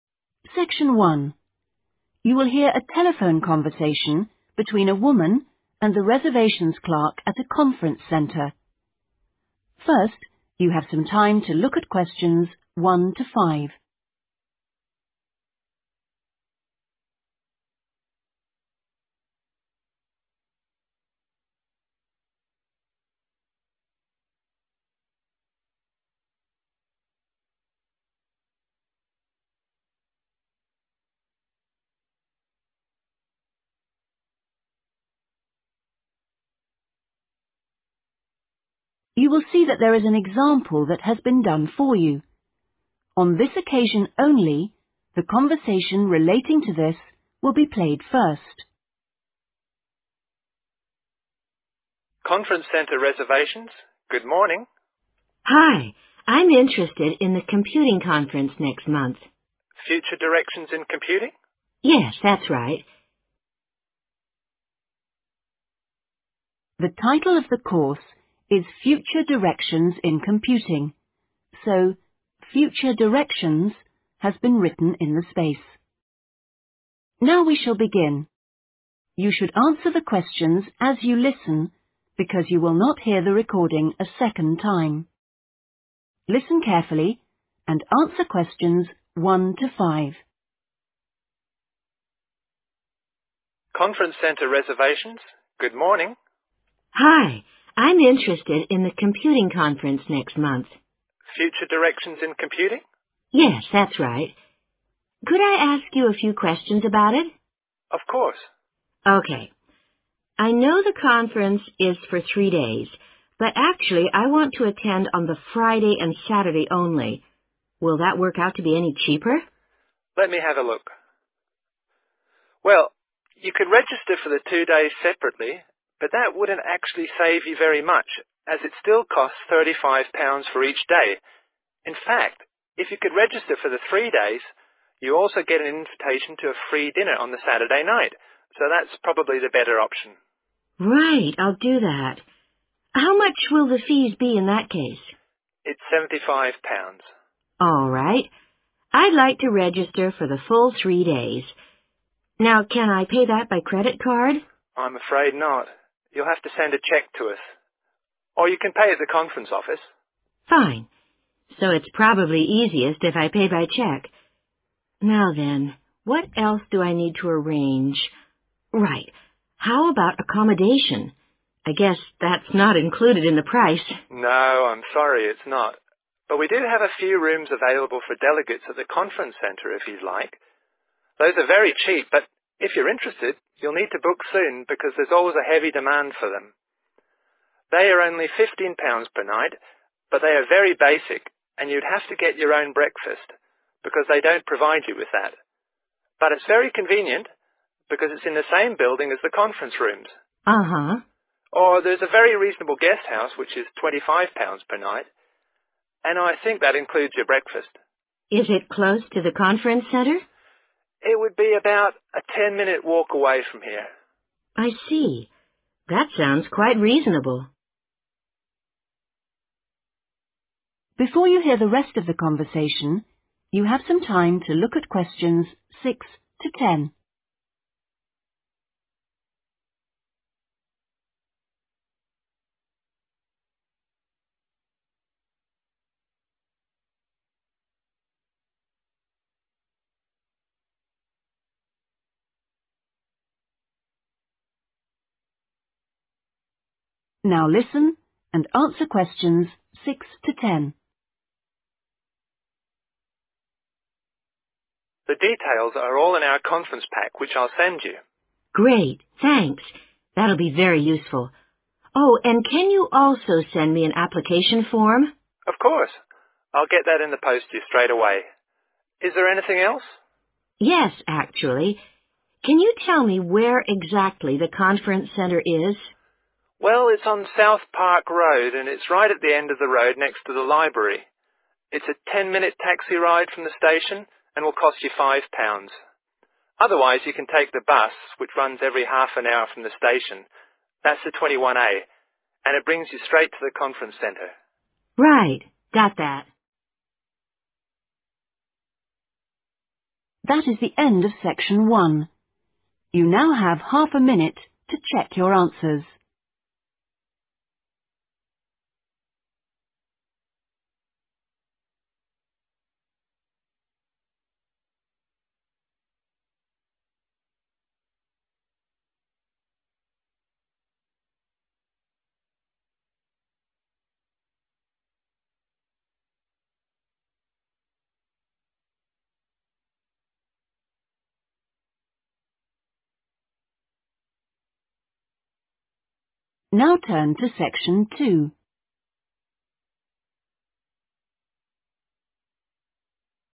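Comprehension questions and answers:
Complete the notes below. Write NO MORE THAN TWO WORDS AND I OR A NUMBER for each answer.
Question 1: Three day cost: 1 £ _______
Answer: 75

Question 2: Payment by 2_______ or on arrival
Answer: cheque

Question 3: 3 £_______ per night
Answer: 15

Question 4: 4 £_______ per night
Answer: 25

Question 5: approximately 5_______ walk from Conference centre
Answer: 10 minutes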